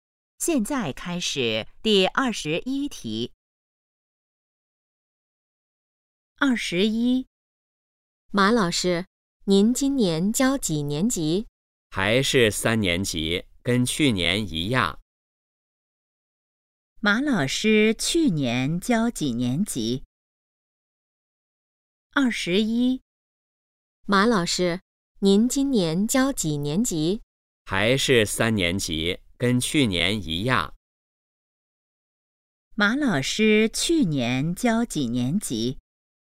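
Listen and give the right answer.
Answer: 三年级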